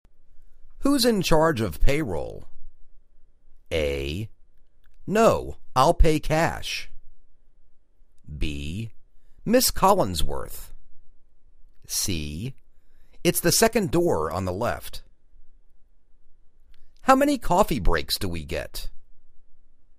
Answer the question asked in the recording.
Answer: Ms. Collinsworth